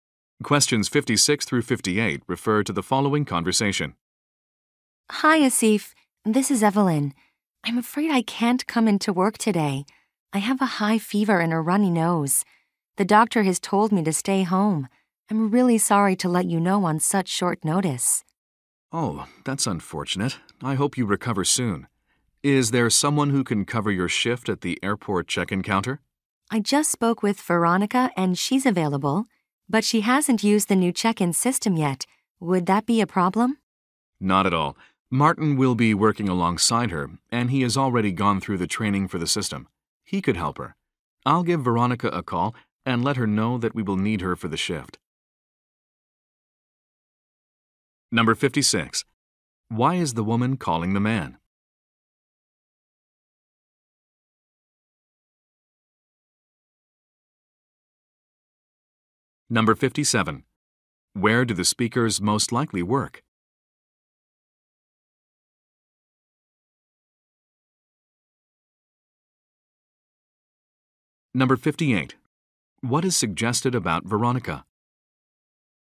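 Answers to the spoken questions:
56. She is sick and can't come to work
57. At an airport
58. She hasn't used the new check-in system yet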